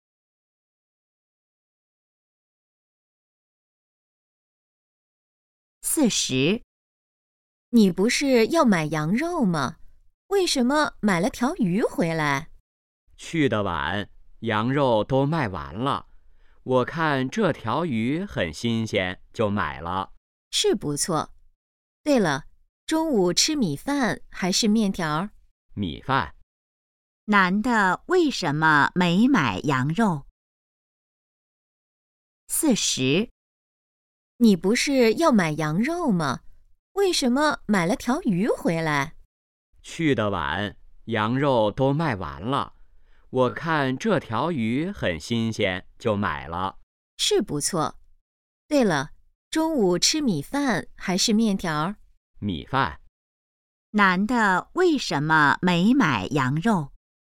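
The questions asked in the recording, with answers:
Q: 男的为什么没买羊肉?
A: 羊肉卖完了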